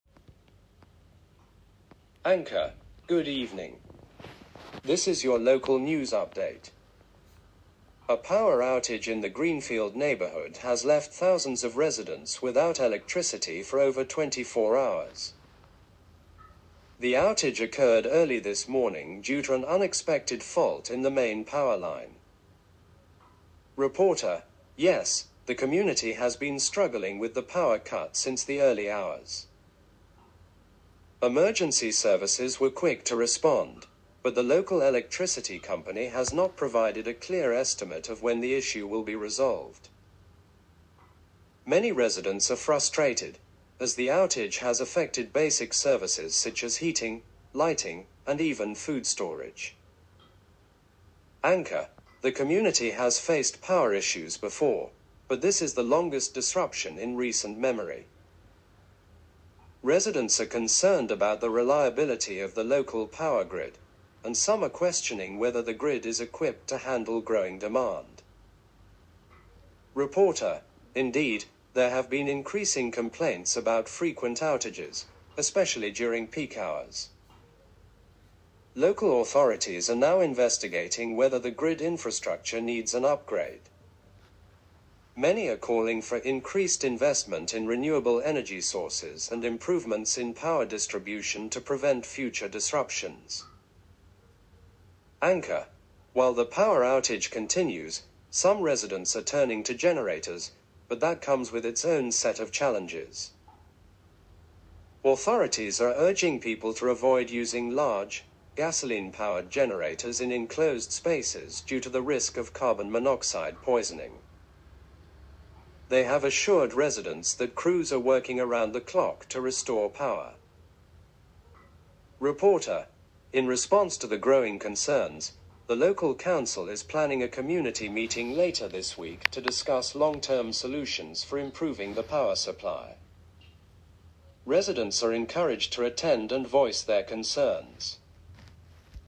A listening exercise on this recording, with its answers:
Questions 1 to 5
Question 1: The power outage in Greenfield neighborhood lasted for ________ hours.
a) 12 hours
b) 24 hours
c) 48 hours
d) 72 hours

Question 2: The local electricity company has not provided a ________ for when the issue will be resolved.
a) solution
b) estimate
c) explanation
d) apology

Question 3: Residents are questioning whether the local power grid is equipped to handle ________ demand.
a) decreasing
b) growing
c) predictable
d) average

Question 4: Authorities are urging people not to use ________ in enclosed spaces due to safety concerns.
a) portable stoves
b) large, gasoline-powered generators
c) electric heaters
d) air conditioning units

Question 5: The local council is planning a community meeting to discuss ________ for improving the power supply.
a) short-term solutions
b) government intervention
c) long-term solutions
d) emergency responses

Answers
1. b) 24 hours
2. b) estimate
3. b) growing
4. b) large, gasoline-powered generators
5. c) long-term solutions

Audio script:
Anchor:
Good evening. This is your local news update. A power outage in the Greenfield neighborhood has left thousands of residents without electricity for over 24 hours. The outage occurred early this morning due to an unexpected fault in the main power line.
Reporter:
Yes, the community has been struggling with the power cut since the early hours. Emergency services were quick to respond, but the local electricity company has not provided a clear estimate of when the issue will be resolved. Many residents are frustrated, as the outage has affected basic services such as heating, lighting, and even food storage.
Anchor:
The community has faced power issues before, but this is the longest disruption in recent memory. Residents are concerned about the reliability of the local power grid, and some are questioning whether the grid is equipped to handle growing demand.
Reporter:
Indeed, there have been increasing complaints about frequent outages, especially during peak hours. Local authorities are now investigating whether the grid infrastructure needs an upgrade. Many are calling for increased investment in renewable energy sources and improvements in power distribution to prevent future disruptions.
Anchor:
While the power outage continues, some residents are turning to generators, but that comes with its own set of challenges. Authorities are urging people to avoid using large, gasoline-powered generators in enclosed spaces due to the risk of carbon monoxide poisoning. They have assured residents that crews are working around the clock to restore power.
Reporter:
In response to the growing concerns, the local council is planning a community meeting later this week to discuss long-term solutions for improving the power supply. Residents are encouraged to attend and voice their concerns.

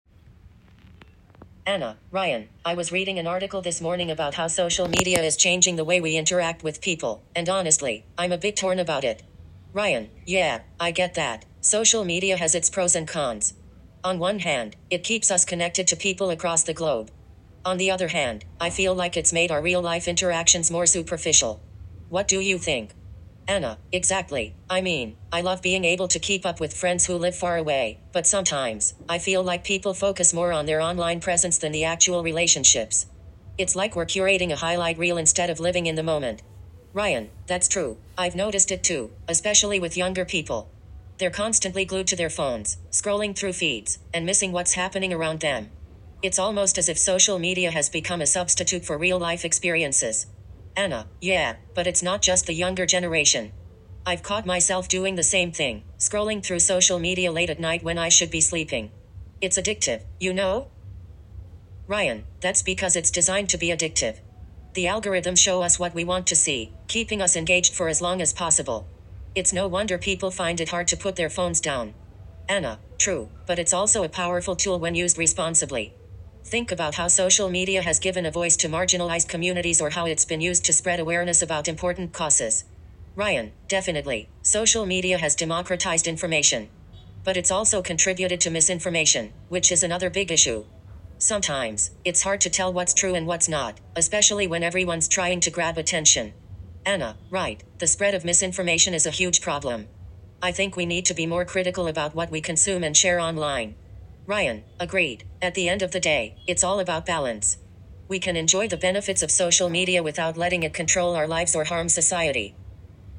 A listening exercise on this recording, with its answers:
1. What concern does Anna express about social media?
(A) It doesnâ€TMt allow people to stay connected globally.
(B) It prioritizes real-life interactions over online relationships.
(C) It encourages people to focus more on their online presence than real relationships.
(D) It is not accessible to everyone.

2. According to Ryan, why is social media addictive?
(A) Because people want to stay informed.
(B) Because algorithms are designed to keep users engaged.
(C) Because it is only popular among younger people.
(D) Because it provides accurate information quickly.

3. What positive impact of social media does Anna mention?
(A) It helps improve sleep patterns.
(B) It allows marginalized communities to have a voice.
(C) It promotes superficial interactions.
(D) It prevents misinformation from spreading.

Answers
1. (C) It encourages people to focus more on their online presence than real relationships.
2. (B) Because algorithms are designed to keep users engaged.
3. (B) It allows marginalized communities to have a voice.

